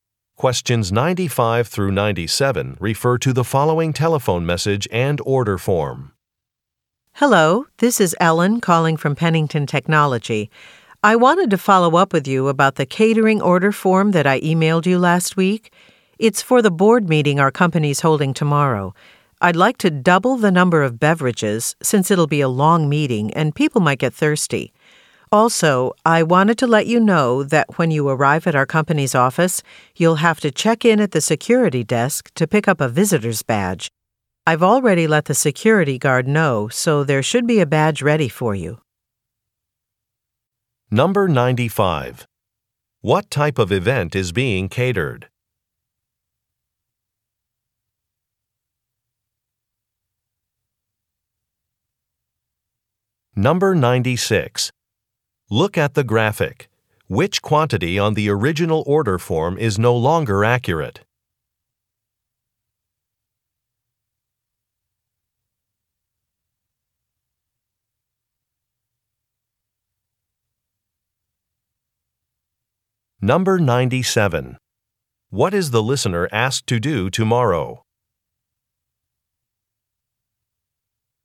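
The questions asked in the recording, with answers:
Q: What type of event is being catered?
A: A board meeting

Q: What is the listener asked to do tomorrow?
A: Check in at the security desk to get a visitor's badge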